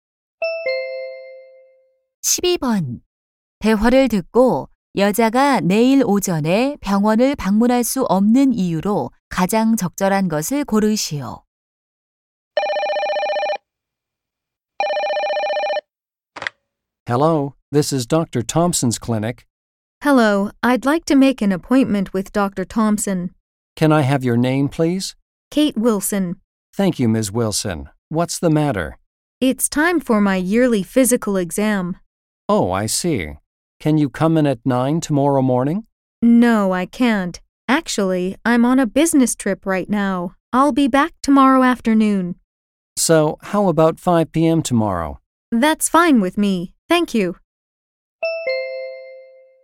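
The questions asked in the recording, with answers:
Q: 대화를 듣고 여자가 내일 오전에 병원을 방문할 수 없는 이유로 가장 적절한 것을 고르시오.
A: 출장 중이라서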